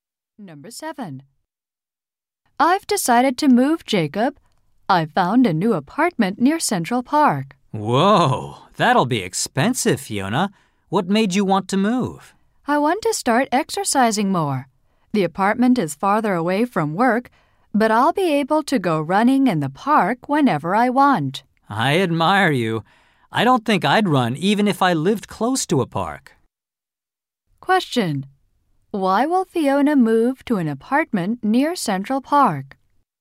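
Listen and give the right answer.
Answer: So she can go running in the park and exercise more.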